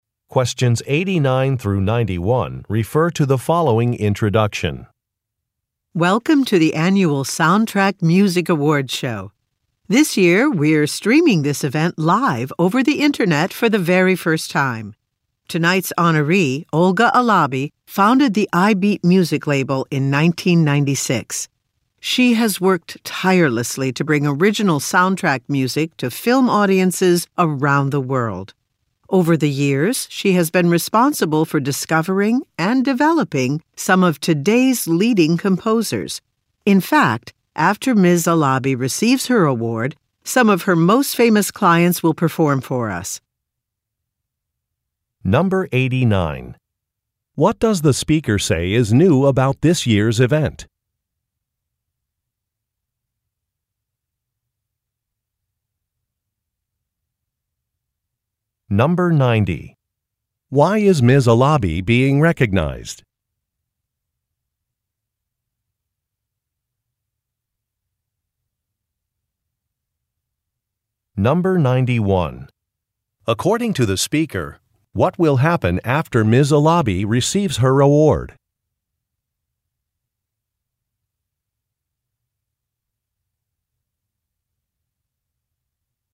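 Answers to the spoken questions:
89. It is being streamed live over the internet for the first time.
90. For bringing original soundtrack music to film audiences and developing leading composers.
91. Some of her famous clients will perform.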